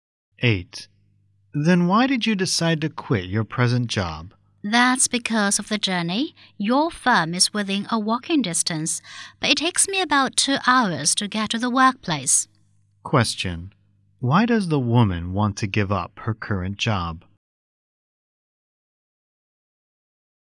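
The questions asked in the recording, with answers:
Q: Why does the woman want to give up her current job?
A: It takes too long to get to work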